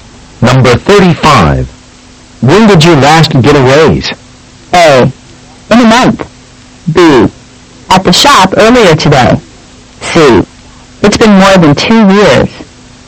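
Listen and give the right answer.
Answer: C: It's been more than 2 years.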